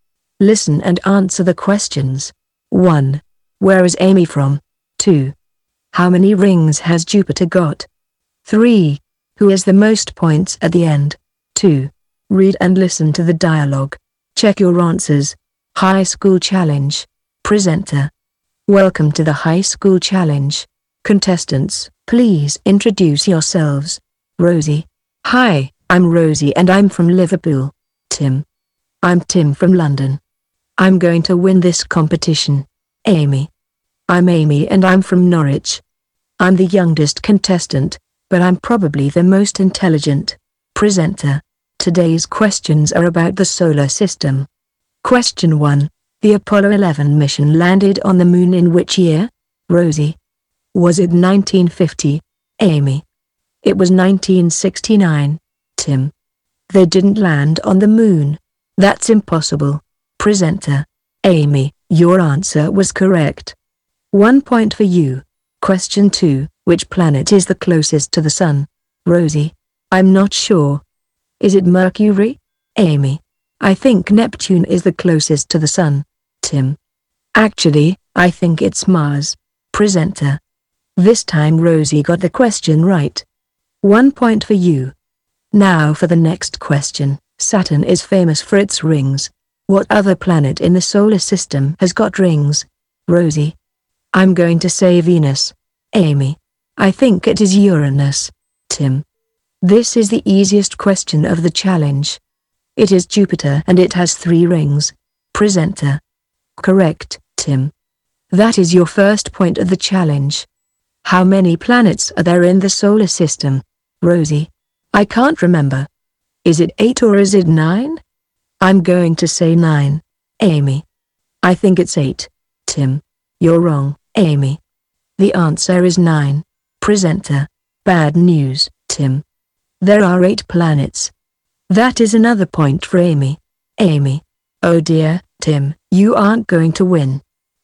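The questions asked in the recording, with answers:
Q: Where is Amy from?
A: Norwich

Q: Who has the most points at the end?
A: Amy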